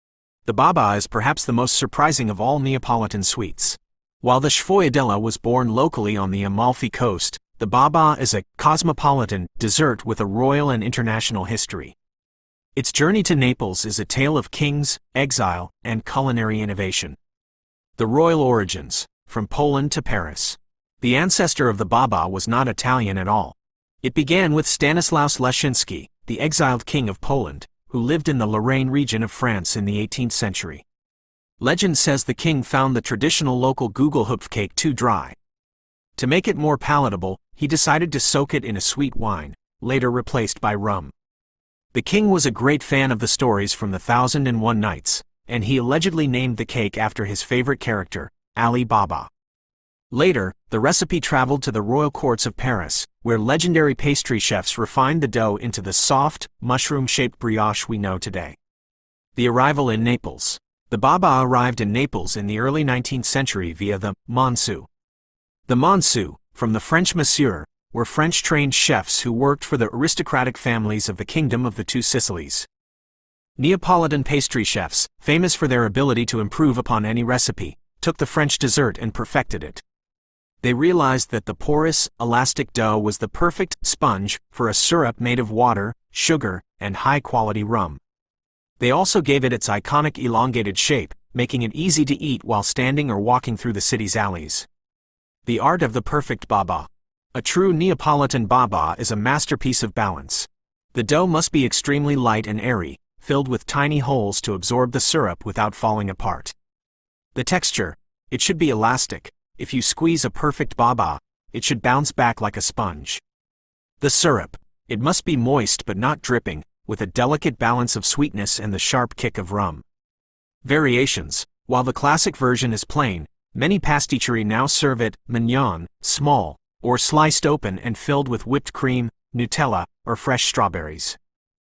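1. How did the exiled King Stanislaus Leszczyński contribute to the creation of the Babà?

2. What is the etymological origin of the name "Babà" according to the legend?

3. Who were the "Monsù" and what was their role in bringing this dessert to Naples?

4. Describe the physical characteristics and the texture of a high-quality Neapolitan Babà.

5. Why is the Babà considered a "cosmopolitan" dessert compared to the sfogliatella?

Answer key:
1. He found the local Gugelhupf cake too dry and soaked it in sweet wine, later replaced by rum.
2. It was named after Ali Baba, the king's favourite character from The Thousand and One Nights.
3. French-trained chefs working for aristocratic families of the Kingdom of the Two Sicilies; they brought the babà to Naples in the early 19th century.
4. Light, airy dough full of tiny holes; elastic so it bounces back like a sponge; moist but not dripping, with sweetness and a kick of rum; elongated shape.
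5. Because unlike the locally born sfogliatella, it has a royal and international history, coming from Poland via France.

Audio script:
The Babà is perhaps the most surprising of all Neapolitan sweets. While the sfogliatella was born locally on the Amalfi Coast, the Babà is a "cosmopolitan" dessert with a royal and international history. Its journey to Naples is a tale of kings, exile, and culinary innovation.
The Royal Origins: From Poland to Paris
The ancestor of the Babà was not Italian at all. It began with Stanislaus Leszczyński, the exiled King of Poland, who lived in the Lorraine region of France in the 18th century. Legend says the King found the traditional local Gugelhupf cake too dry. To make it more palatable, he decided to soak it in a sweet wine (later replaced by rum).
The King was a great fan of the stories from The Thousand and One Nights, and he allegedly named the cake after his favorite character: Ali Baba. 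Later, the recipe traveled to the royal courts of Paris, where legendary pastry chefs refined the dough into the soft, mushroom-shaped brioche we know today.
The Arrival in Naples
The Babà arrived in Naples in the early 19th century via the "Monsù". The Monsù (from the French Monsieur) were French-trained chefs who worked for the aristocratic families of the Kingdom of the Two Sicilies. Neapolitan pastry chefs, famous for their ability to improve upon any recipe, took the French dessert and perfected it.
They realized that the porous, elastic dough was the perfect "sponge" for a syrup made of water, sugar, and high-quality rum. They also gave it its iconic elongated shape, making it easy to eat while standing or walking through the city's alleys.
The Art of the Perfect Babà
A true Neapolitan Babà is a masterpiece of balance. The dough must be extremely light and airy, filled with tiny holes to absorb the syrup without falling apart.
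• The Texture: It should be elastic; if you squeeze a perfect Babà, it should bounce back like a sponge.
• The Syrup: It must be moist but not dripping, with a delicate balance of sweetness and the sharp kick of rum.
• Variations: While the classic version is plain, many pasticcerie now serve it "mignon" (small) or sliced open and filled with whipped cream, Nutella, or fresh strawberries.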